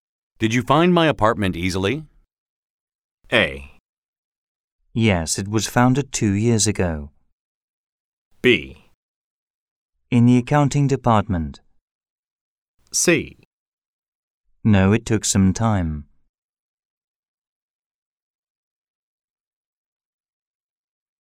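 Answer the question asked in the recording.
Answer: C: No, it took some time.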